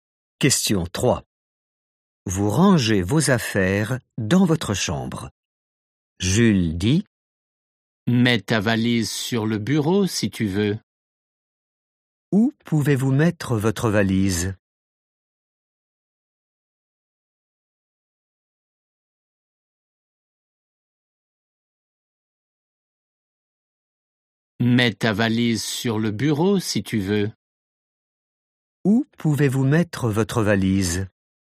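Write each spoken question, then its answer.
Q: Où pouvez-vous mettre votre valise?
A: sur le bureau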